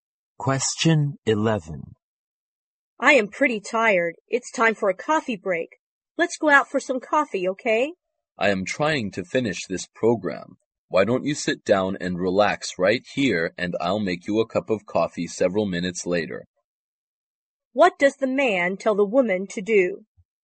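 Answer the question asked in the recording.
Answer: Sit down and relax there while he makes her coffee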